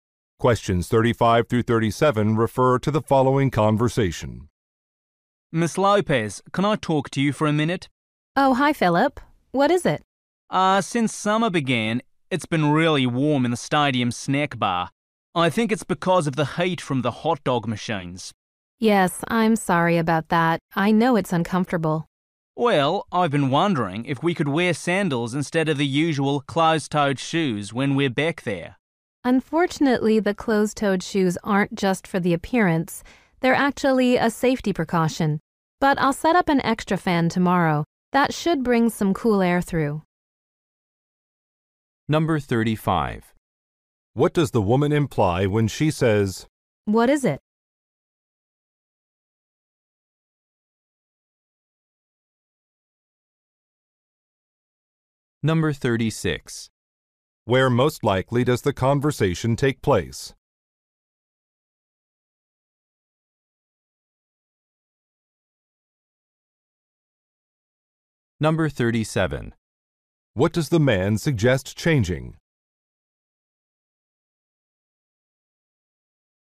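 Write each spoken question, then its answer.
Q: Where most likely does the conversation take place?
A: At a stadium snack bar

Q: What does the man suggest changing?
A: The footwear rule, so staff can wear sandals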